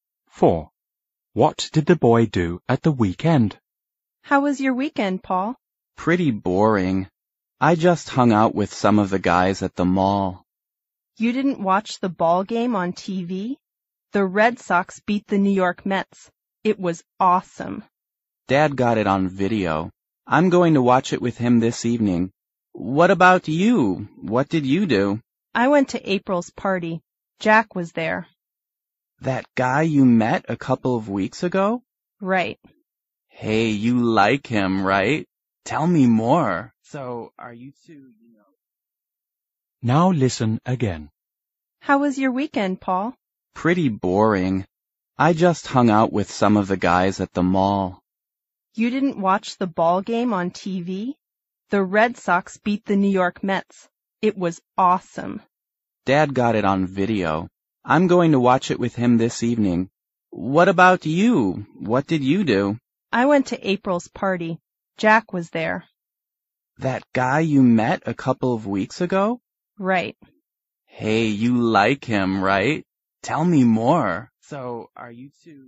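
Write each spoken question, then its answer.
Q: What did the boy do at the weekend?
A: He hung out with friends at the mall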